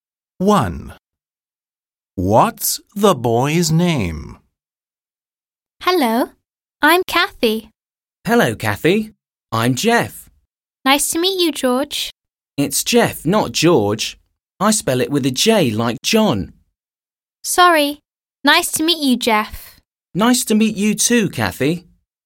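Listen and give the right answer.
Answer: Jeff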